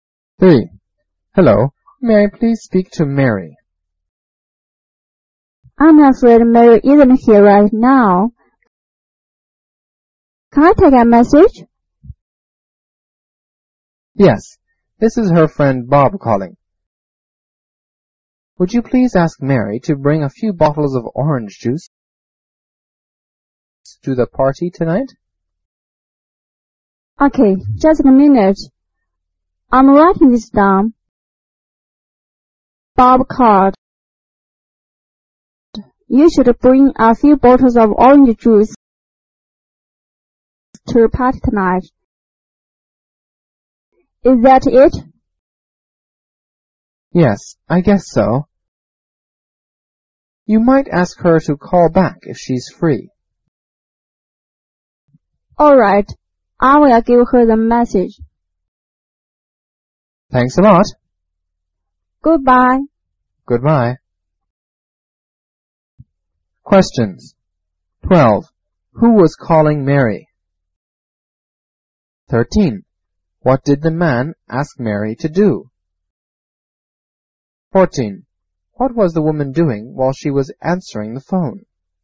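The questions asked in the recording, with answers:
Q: Who was calling Mary?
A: Her friend Bob

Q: What did the man ask Mary to do?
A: Bring a few bottles of orange juice to the party tonight

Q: What was the woman doing while she was answering the phone?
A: Writing down the message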